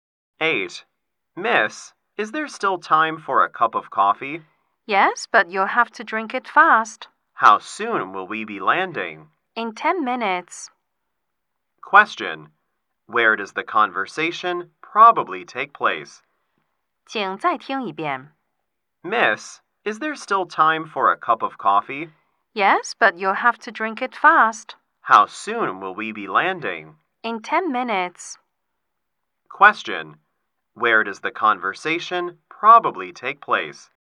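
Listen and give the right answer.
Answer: On a plane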